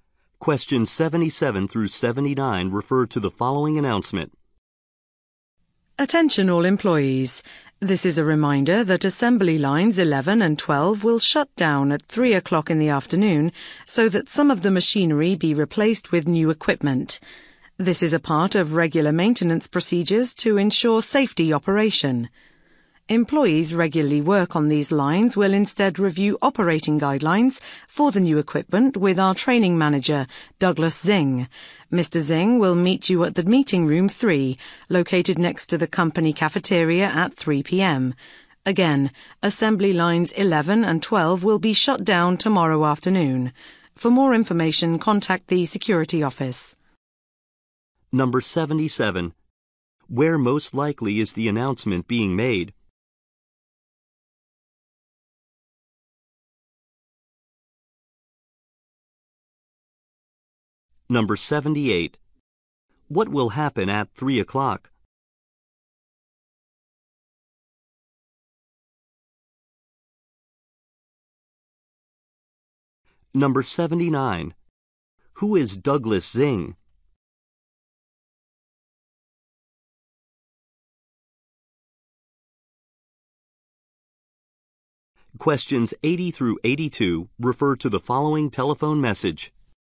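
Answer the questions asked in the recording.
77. At a factory
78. Assembly lines 11 and 12 will shut down for equipment replacement
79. A training manager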